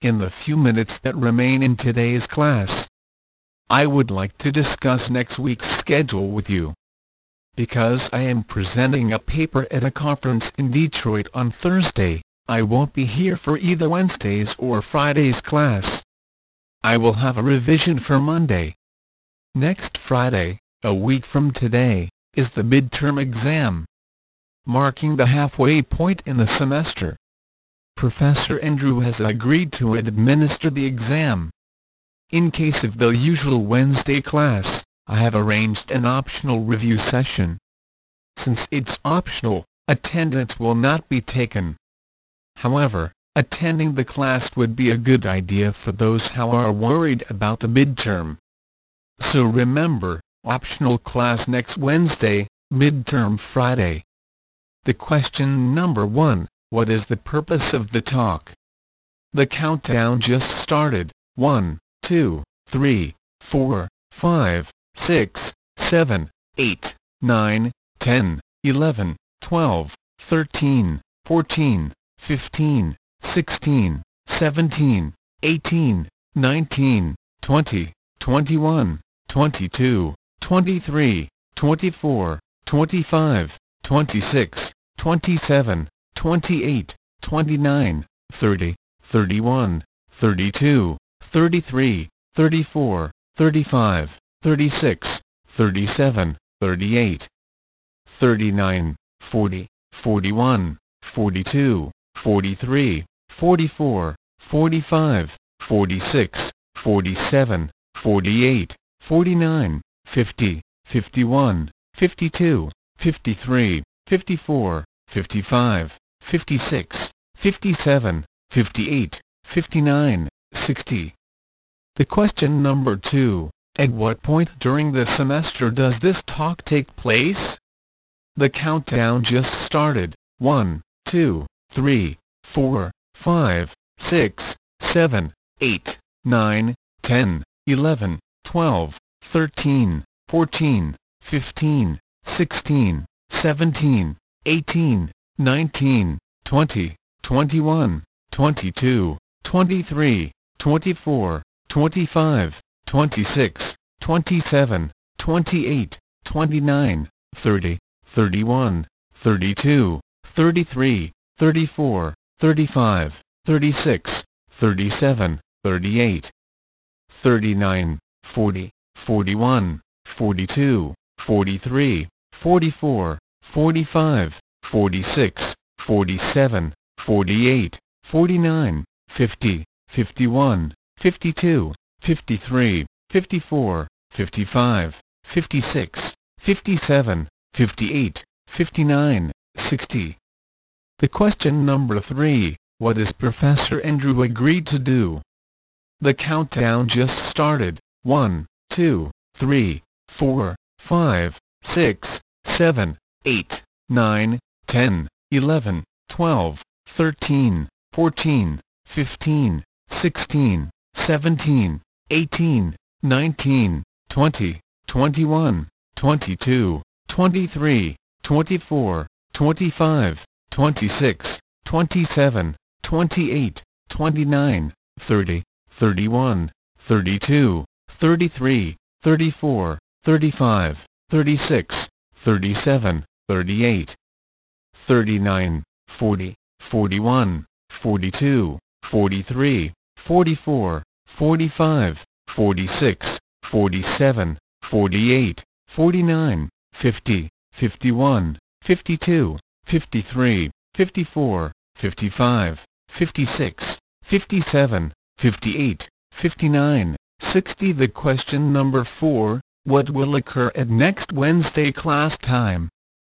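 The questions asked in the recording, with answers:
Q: What is the purpose of the talk?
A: To discuss next week's schedule

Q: at what point during the semester does this talk take place?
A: About halfway through the semester, a week before the midterm

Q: what is Professor Andrew agreed to do?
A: Give the midterm exam

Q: what will occur at next Wednesday class time?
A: An optional review session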